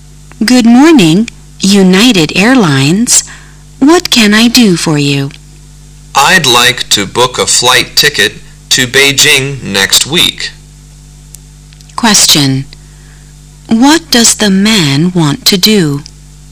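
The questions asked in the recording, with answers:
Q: What does the man want to do?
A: Book a flight ticket to Beijing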